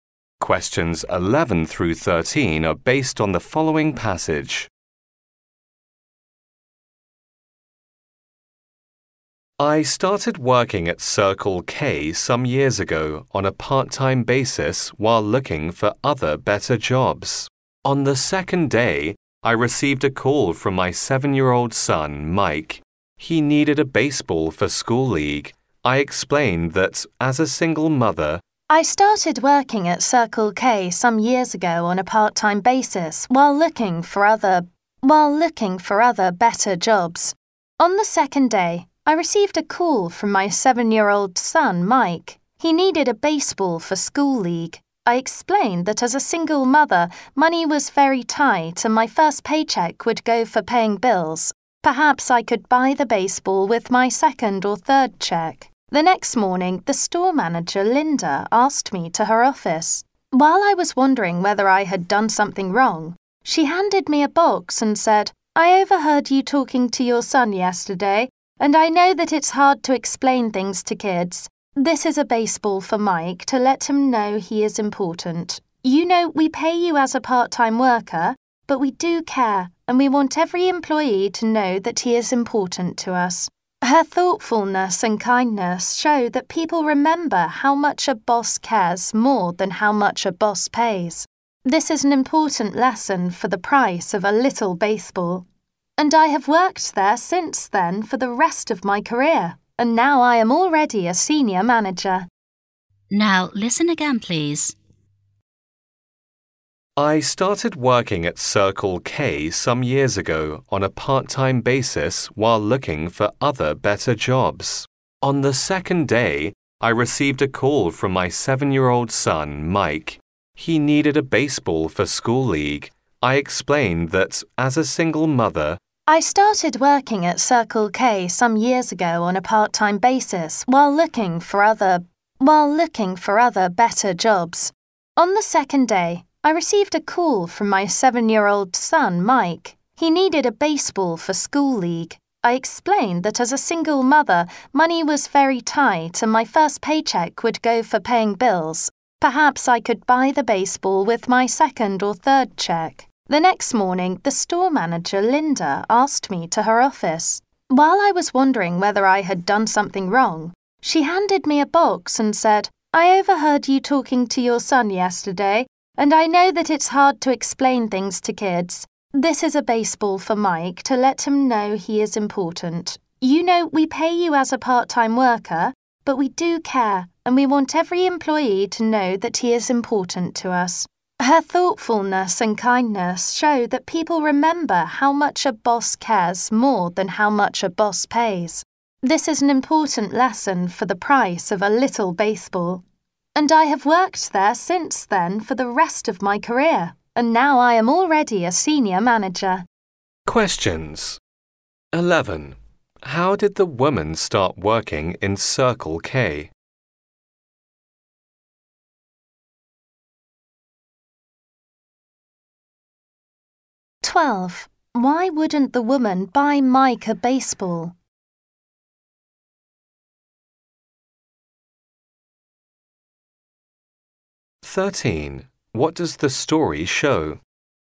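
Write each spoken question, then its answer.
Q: How did the woman start working in Circle K?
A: As a part-time worker while looking for better jobs

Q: Why wouldn't the woman buy Mike a baseball?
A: Money was tight; her first paycheck was for bills

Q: What does the story show?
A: People remember how much a boss cares more than how much he pays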